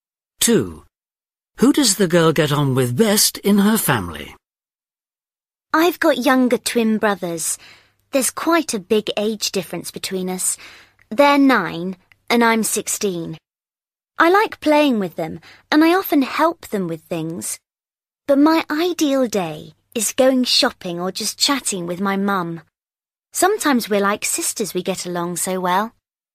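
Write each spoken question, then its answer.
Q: Who does the girl get on with best in her family?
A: her mum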